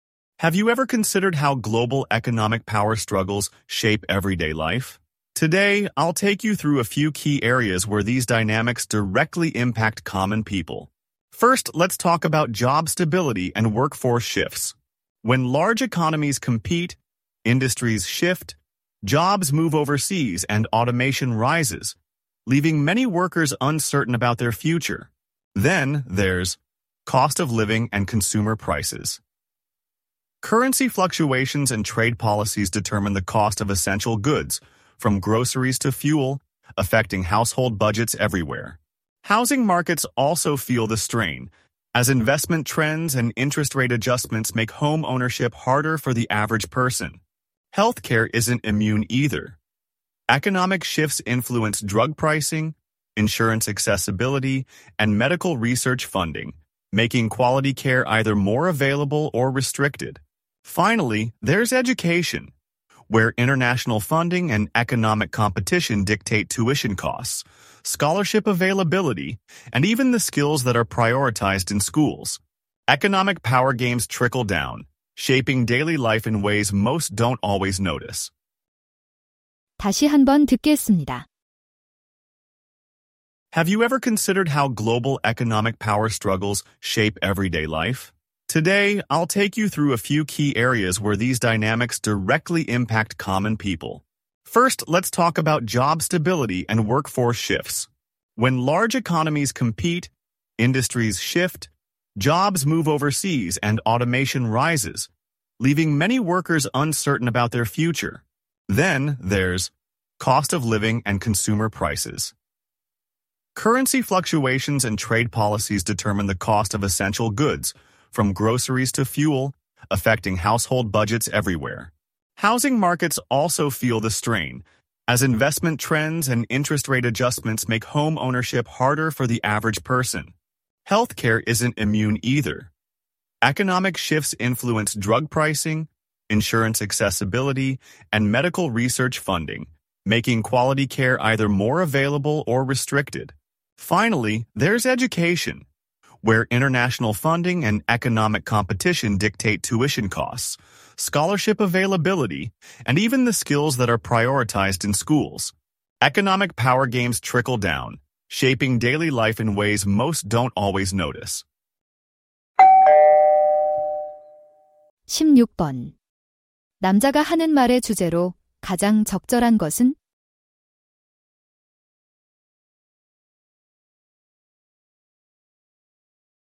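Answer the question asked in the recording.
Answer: 세계 경제 패권 다툼이 일상생활에 미치는 영향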